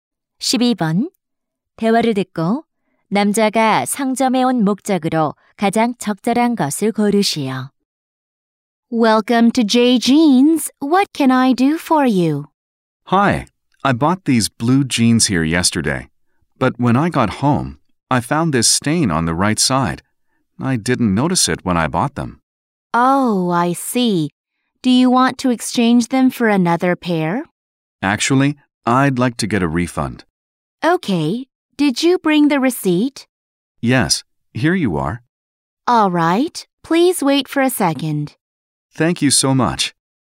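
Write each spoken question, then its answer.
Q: 대화를 듣고 남자가 상점에 온 목적으로 가장 적절한 것을 고르시오.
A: 청바지 환불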